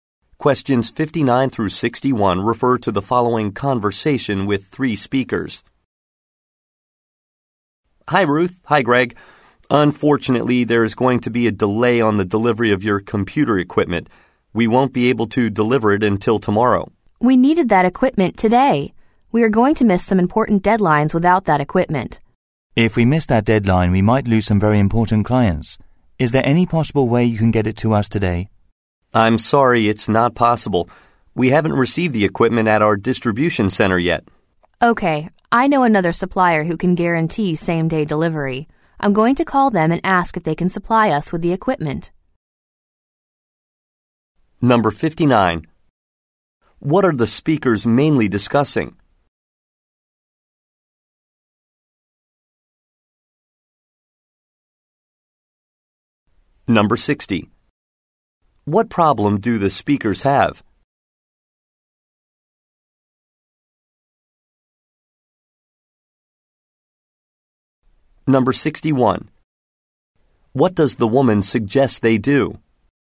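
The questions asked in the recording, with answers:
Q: What are the speakers mainly discussing?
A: A delayed delivery of computer equipment

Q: What problem do the speakers have?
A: They might miss important deadlines and lose clients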